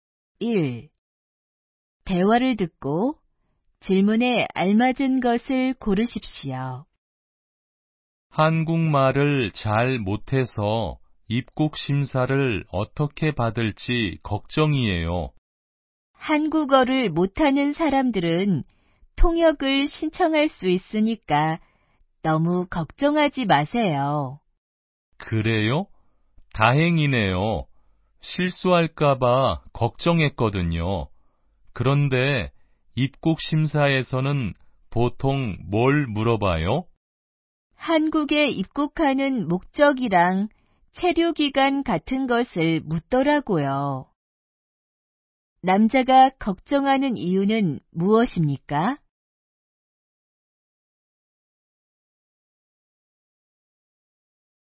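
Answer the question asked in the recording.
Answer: 한국말을 잘 못해서 입국 심사를 받을 때 실수할까 봐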